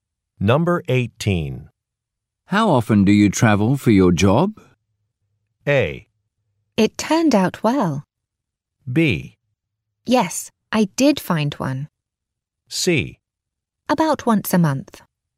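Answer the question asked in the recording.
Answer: C: About once a month.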